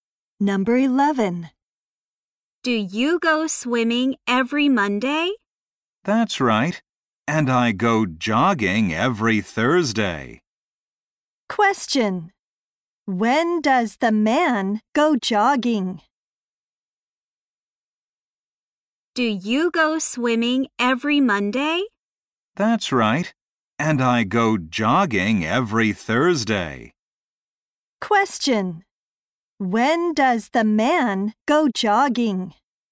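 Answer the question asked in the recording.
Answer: Every Thursday.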